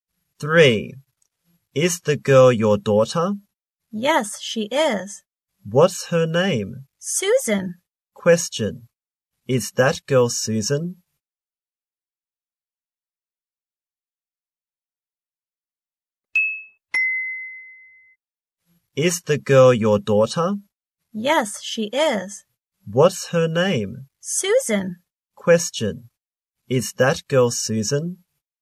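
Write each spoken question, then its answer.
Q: Is that girl Susan?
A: Yes, she is.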